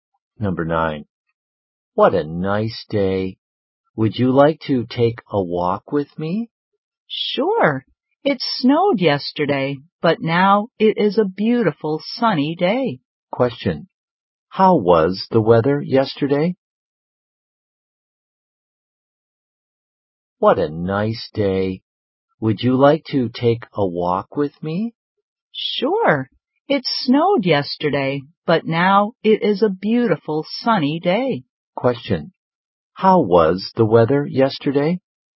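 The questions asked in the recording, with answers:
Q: How was the weather yesterday?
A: Snowy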